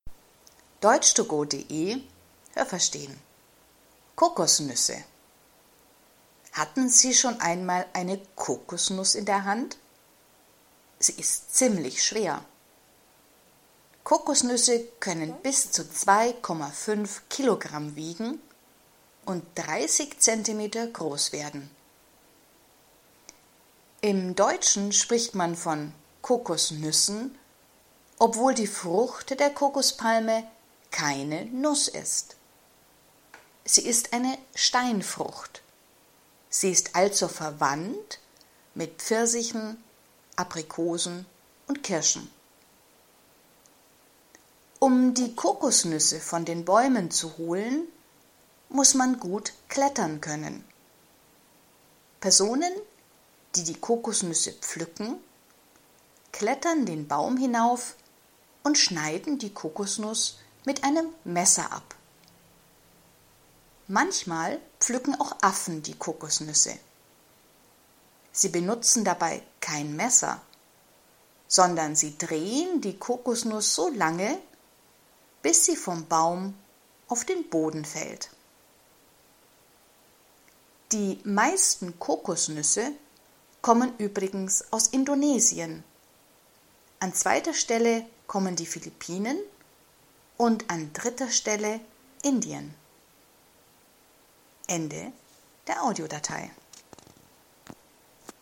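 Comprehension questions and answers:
Haben Sie das gehört? Stimmt diese Aussage?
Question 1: Kokosnüsse können 25 Kilo schwer werden.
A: Nein, das habe ich nicht gehört.

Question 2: Kokosnüsse können 30 cm groß werden.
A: Ja, das habe ich gehört.

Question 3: Kokosnüsse, Pfirsiche, Aprikosen und Kirschen gehören zu einer Familie.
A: Ja, das habe ich gehört.

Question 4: Menschen und Affen benutzen ein Messer, wenn sie die Kokosnüsse vom Baum holen.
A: Nein, das habe ich nicht gehört.

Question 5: Die meisten Kokosnüsse kommen aus Indien.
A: Nein, das habe ich nicht gehört.

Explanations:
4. Nur Menschen nehmen ein Messer. Affen drehen die Kokosnüsse, bis sie auf den Boden fallen.

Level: A2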